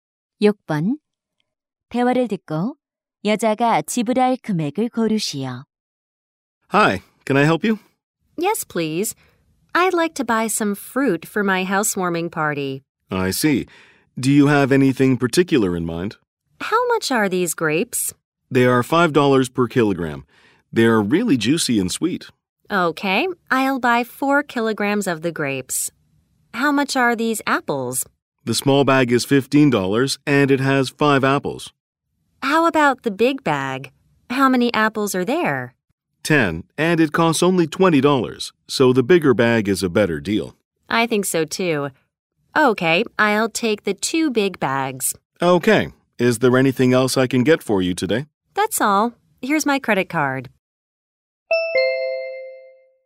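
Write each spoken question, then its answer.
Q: 대화를 듣고 여자가 지불할 금액을 고르시오.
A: $60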